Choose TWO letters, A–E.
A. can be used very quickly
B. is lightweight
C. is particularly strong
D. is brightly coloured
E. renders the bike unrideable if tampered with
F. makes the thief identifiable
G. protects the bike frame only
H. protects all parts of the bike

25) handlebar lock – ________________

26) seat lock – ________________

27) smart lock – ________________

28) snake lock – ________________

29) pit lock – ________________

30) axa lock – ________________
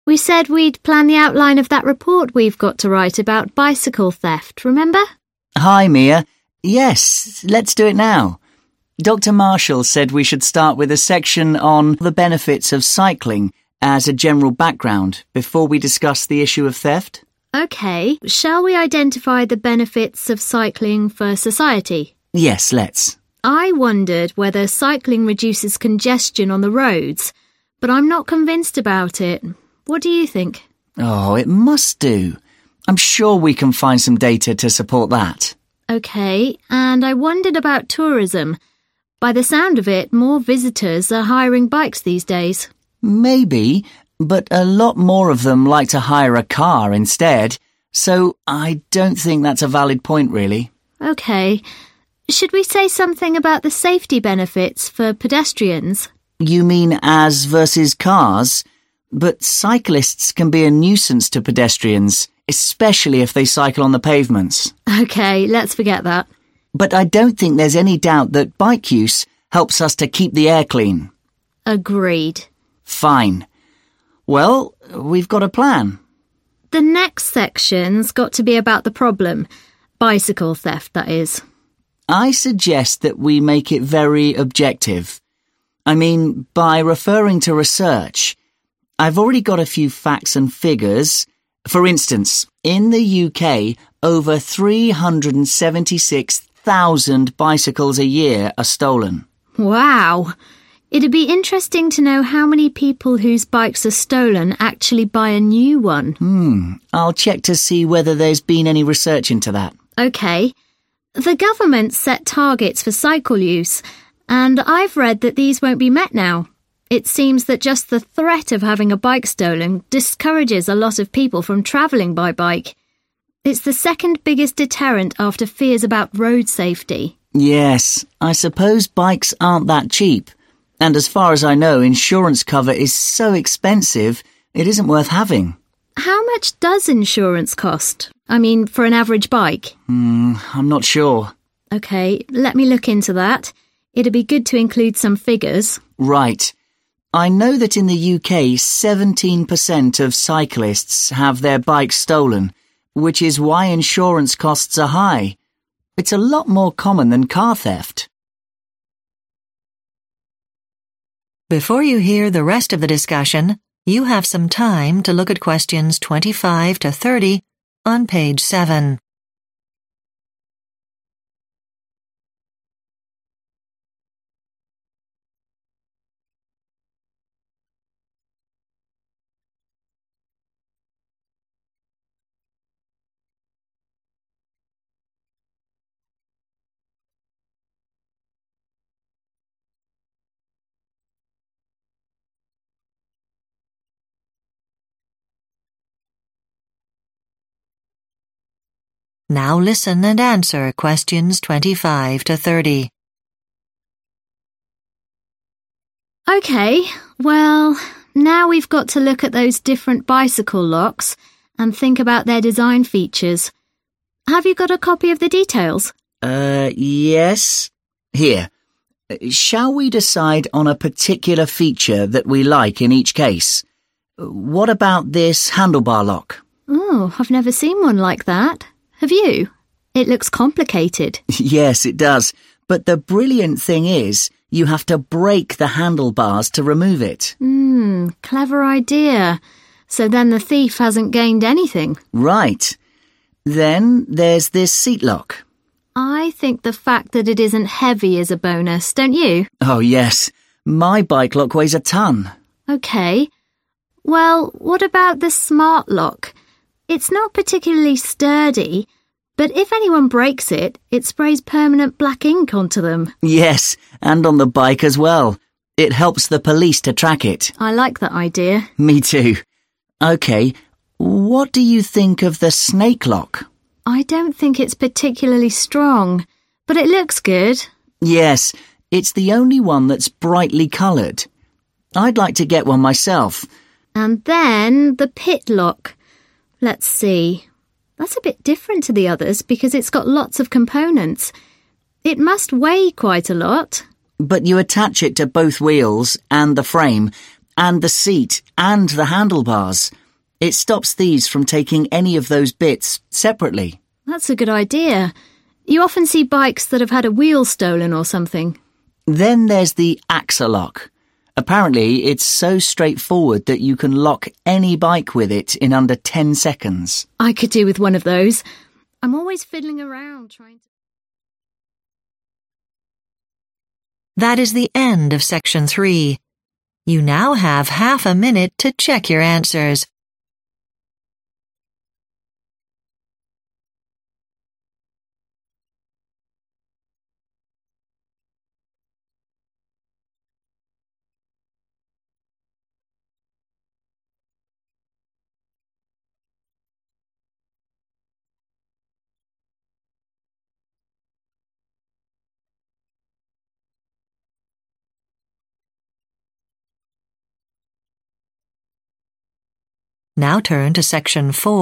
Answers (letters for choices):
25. E
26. B
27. F
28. D
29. H
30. A